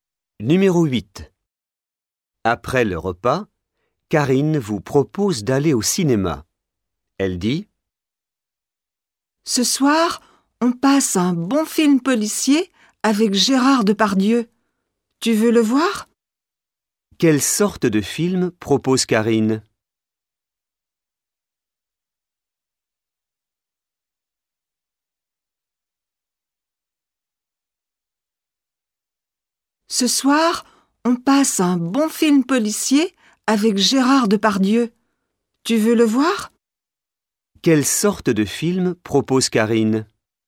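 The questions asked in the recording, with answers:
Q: Quelle sorte de film propose Karine?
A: Un film policier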